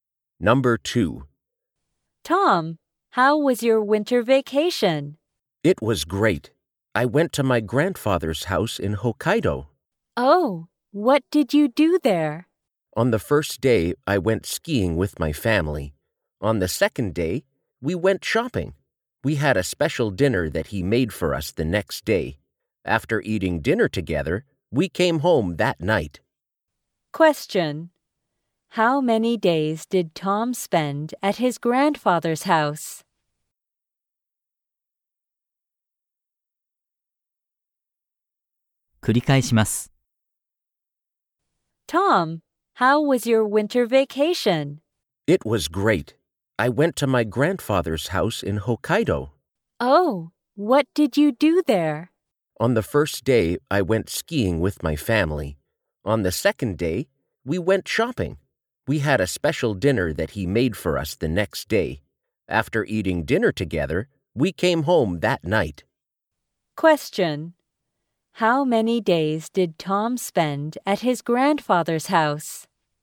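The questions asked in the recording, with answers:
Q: How many days did Tom spend at his grandfather's house?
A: Three days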